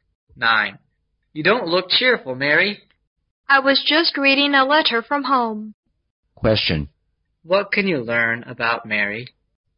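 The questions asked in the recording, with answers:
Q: What can you learn about Mary?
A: She got bad news in a letter from home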